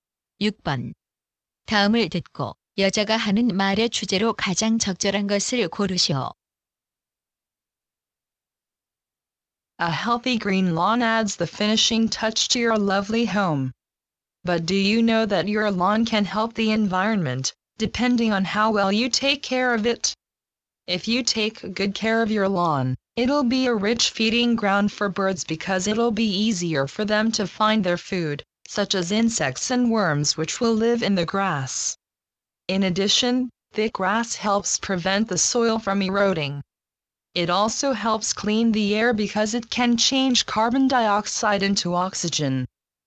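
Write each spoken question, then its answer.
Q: 다음을 듣고 여자가 하는 말의 주제로 가장 적절한 것을 고르시오.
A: 잔디를 잘 가꾸면 환경에 도움이 된다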